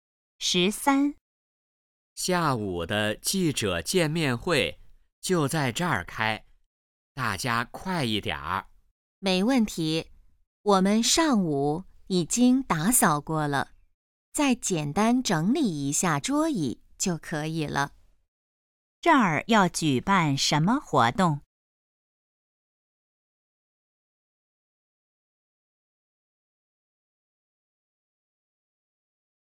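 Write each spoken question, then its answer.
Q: 这儿要举办什么活动?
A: 记者见面会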